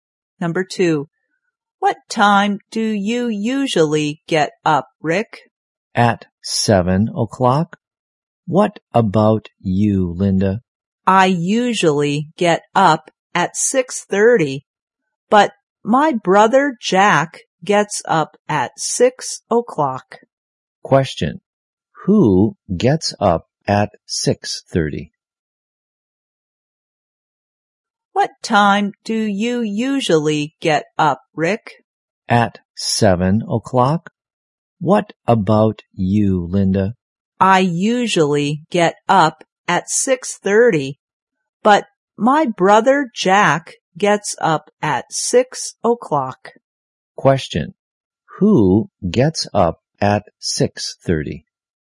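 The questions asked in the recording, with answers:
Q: who gets up at 6:30?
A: Linda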